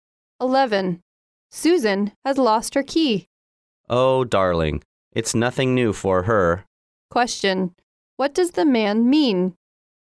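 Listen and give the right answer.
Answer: Susan often loses her keys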